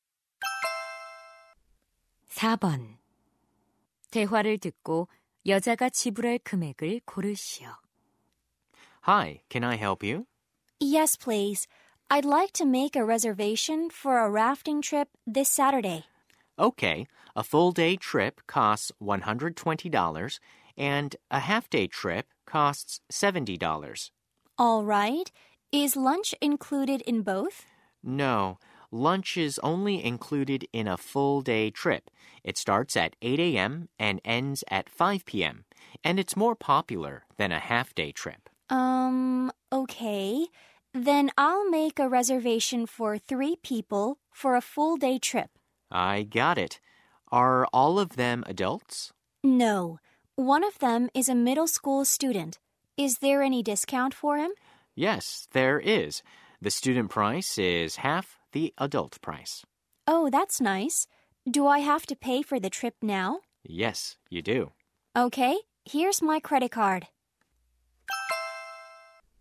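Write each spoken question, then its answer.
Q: 대화를 듣고 여자가 지불할 금액을 고르시오.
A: $300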